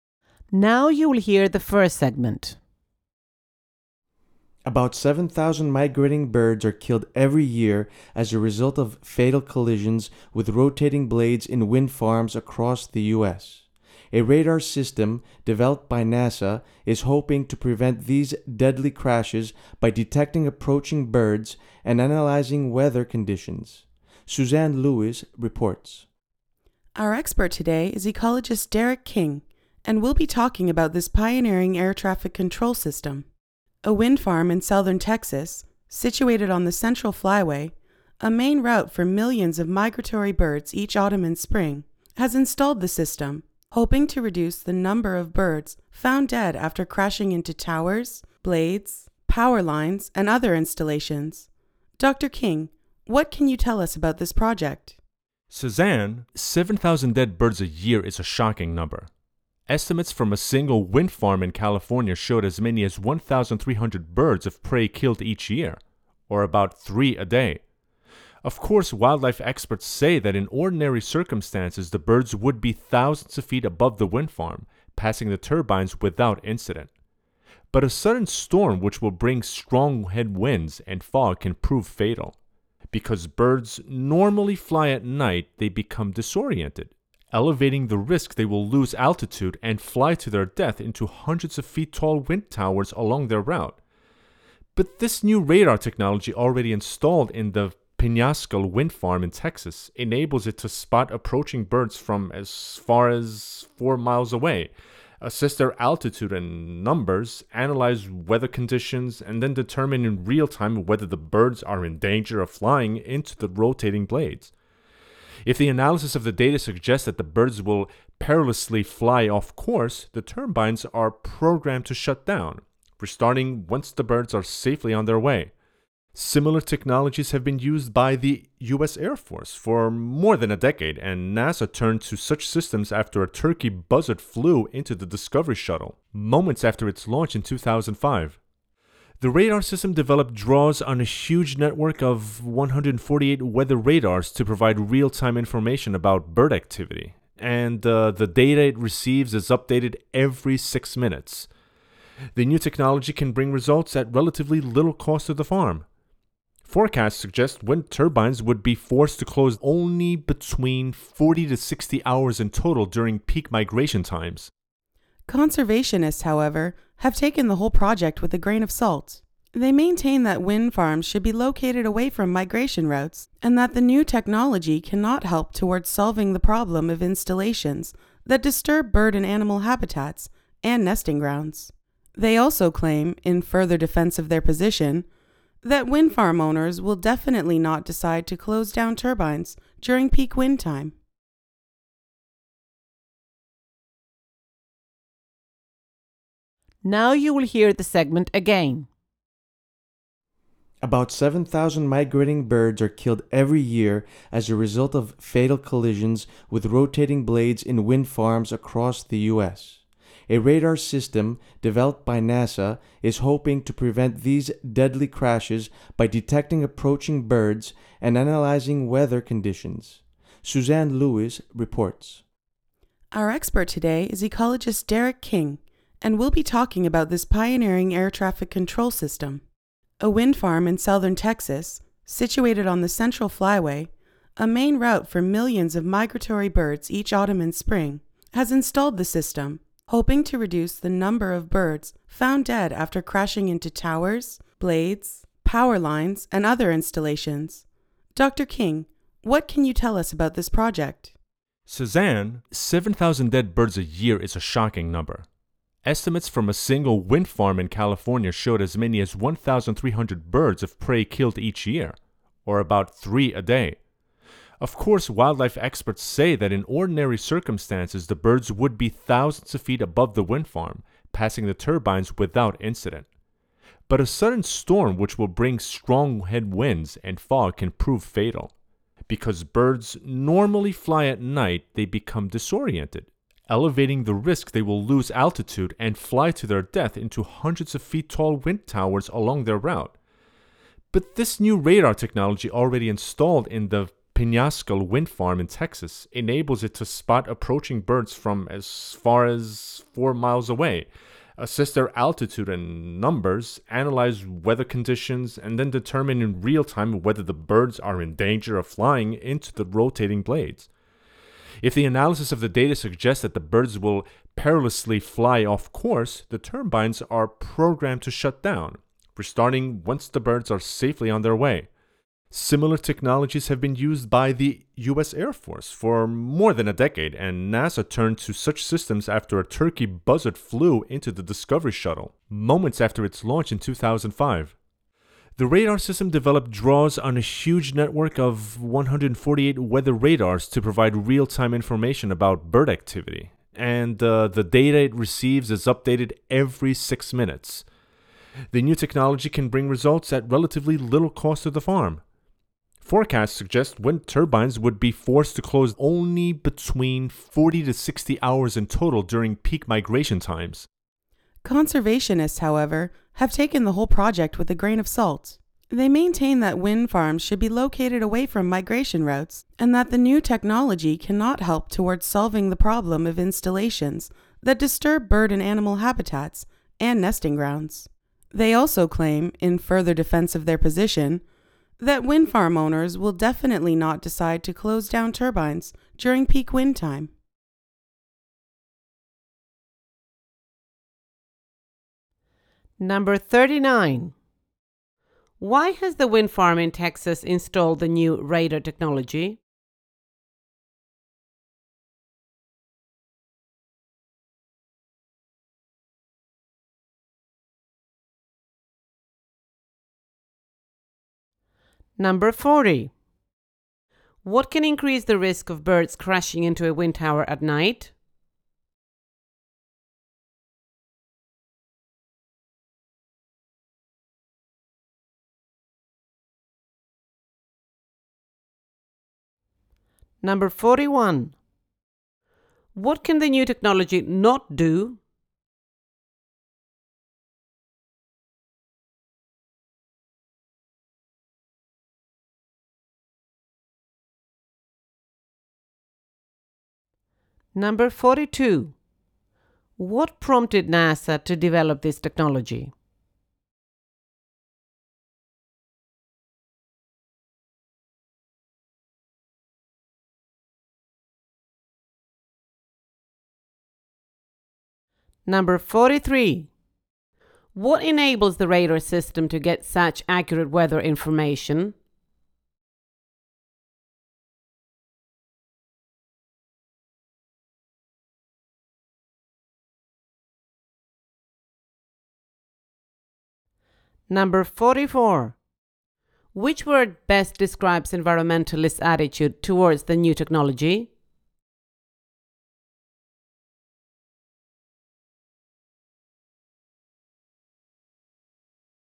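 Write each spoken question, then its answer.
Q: Why has the wind farm in Texas installed the new radar technology?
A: To reduce the number of birds killed by crashing into its towers, blades and other installations

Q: What can increase the risk of birds crashing into a wind tower at night?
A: A sudden storm with strong headwinds and fog, which disorients the birds

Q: What prompted NASA to develop this technology?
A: A turkey buzzard flew into the Discovery Shuttle just after its launch in 2005

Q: What enables the radar system to get such accurate weather information?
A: A huge network of 148 weather radars, with data updated every 6 minutes

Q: Which word best describes environmentalist attitude towards the new technology?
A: Skeptical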